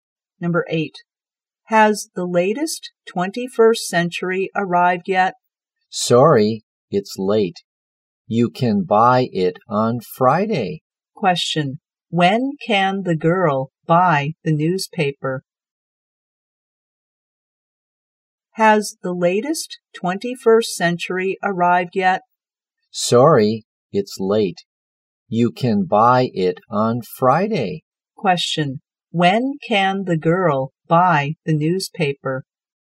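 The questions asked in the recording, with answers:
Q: Question. When can the girl buy the newspaper?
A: On Friday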